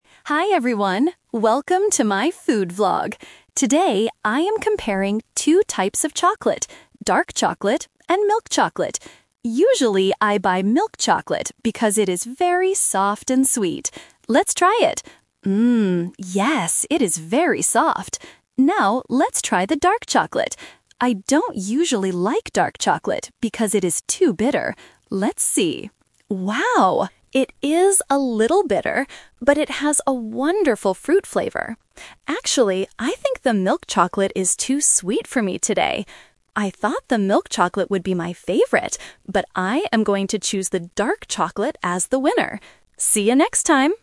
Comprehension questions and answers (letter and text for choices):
Listen to the food vlog and choose the correct answer (A, B, or C).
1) What does the vlogger say about the milk chocolate?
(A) It is very soft and sweet.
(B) It is very bitter.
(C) It is very hard to bite.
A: (A) It is very soft and sweet.

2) Why doesn't the vlogger usually like dark chocolate?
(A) It has a bad fruit flavor.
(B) It is too bitter.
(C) It is too expensive.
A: (B) It is too bitter.

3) Which chocolate is the winner today?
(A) The milk chocolate, because it is soft.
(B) The dark chocolate, because it has a fruit flavor.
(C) She decides that she doesn't like both of them.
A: (B) The dark chocolate, because it has a fruit flavor.

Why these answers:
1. The vlogger clearly states that she usually buys milk chocolate "because it is very soft and sweet." Option B is a trap because being bitter is a feature of the dark chocolate. Option C is a plausible guess for chocolate but is not mentioned.
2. The vlogger says, "I don't usually like dark chocolate because it is too bitter." Option A is a trap because the audio actually says it has a wonderful fruit flavor, not a bad one. Option C is a plausible reason to not buy something, but the price is never mentioned.
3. This question uses the "Twist" technique. The vlogger usually prefers milk chocolate and expected it to be her favorite. However, after tasting them, she changes her mind because the milk chocolate is "too sweet" and the dark chocolate has a "wonderful fruit flavor." She chooses the dark chocolate as the winner. Option A is the main trap (her original expectation). Option C is incorrect.

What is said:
Vlogger: Hi everyone, welcome to my food vlog! Today, I am comparing two types of chocolate: dark chocolate and milk chocolate. Usually, I buy milk chocolate because it is very soft and sweet. Let's try it... Mmm, yes, it is very soft. Now, let's try the dark chocolate. I don't usually like dark chocolate because it is too bitter. Let's see... Wow! It is a little bitter, but it has a wonderful fruit flavor. Actually, I think the milk chocolate is too sweet for me today. I thought the milk chocolate would be my favorite, but I am going to choose the dark chocolate as the winner! See you next time!